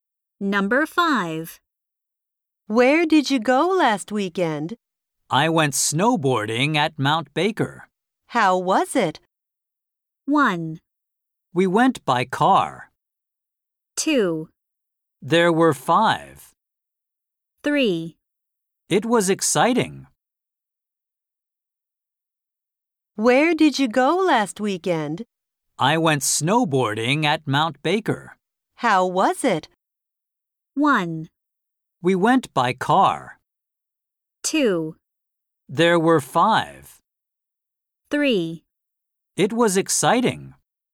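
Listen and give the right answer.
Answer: 3: It was exciting.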